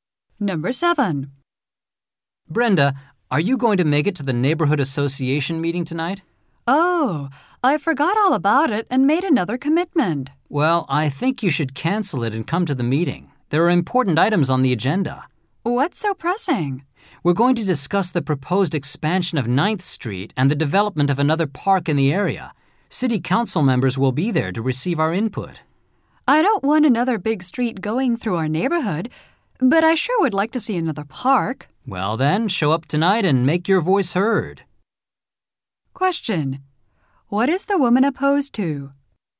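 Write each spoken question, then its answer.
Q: What is the woman opposed to?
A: Widening 9th Street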